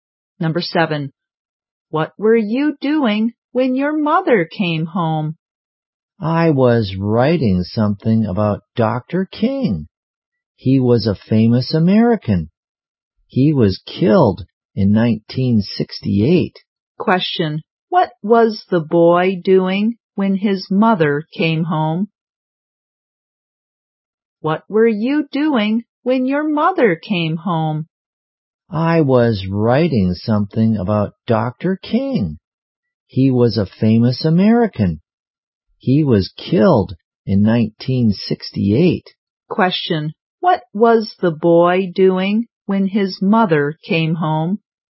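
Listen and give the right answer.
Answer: Writing something about Dr. King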